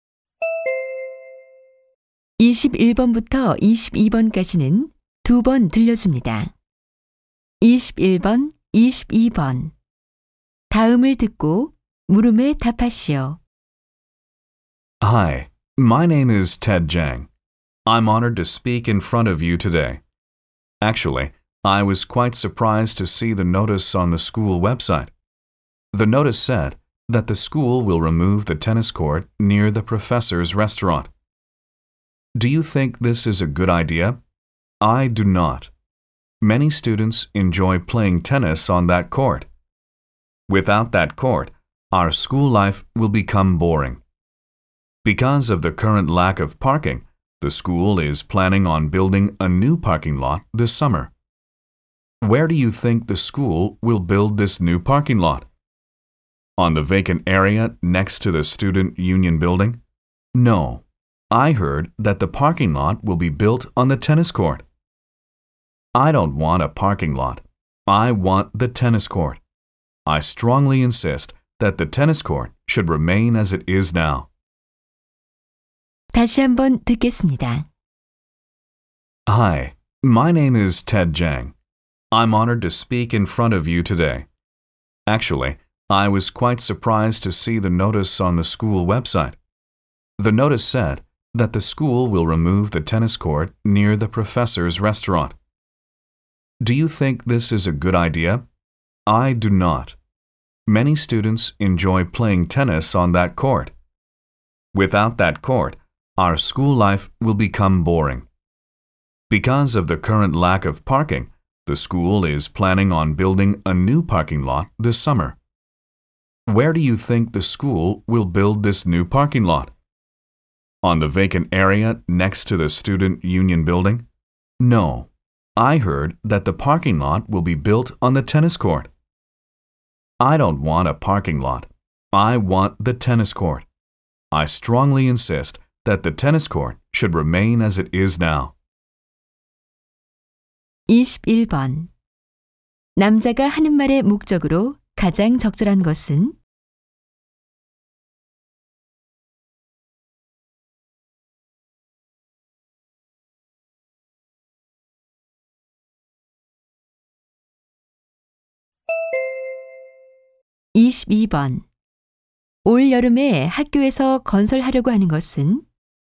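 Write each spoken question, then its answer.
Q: 남자가 하는 말의 목적으로 가장 적절한 것은?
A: 테니스 코트 철거에 반대하려고

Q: 올 여름에 학교에서 건설하려고 하는 것은?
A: 새 주차장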